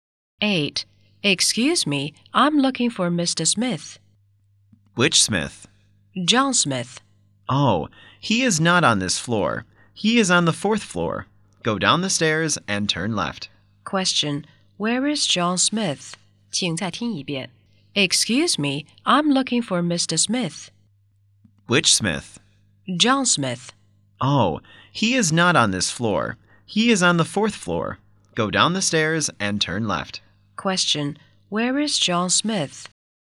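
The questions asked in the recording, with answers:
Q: where is John Smith?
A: On the fourth floor.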